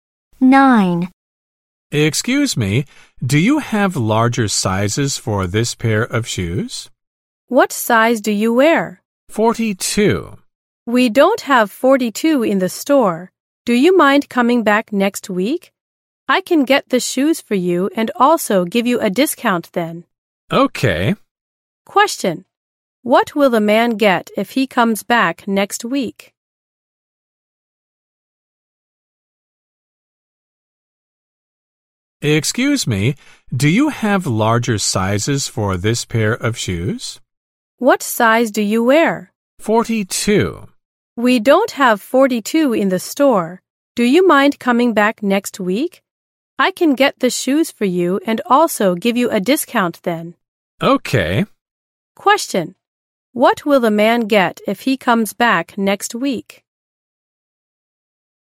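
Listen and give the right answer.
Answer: Size 42 shoes at a discount.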